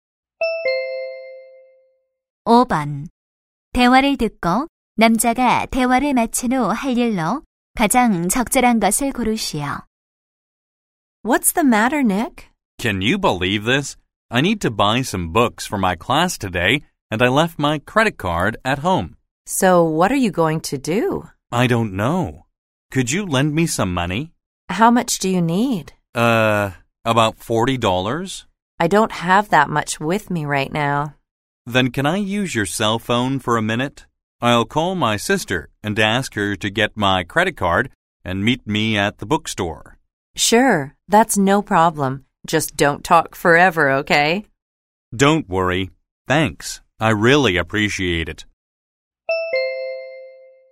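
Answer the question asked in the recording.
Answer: 여자의 휴대전화로 누나(여동생)에게 전화하기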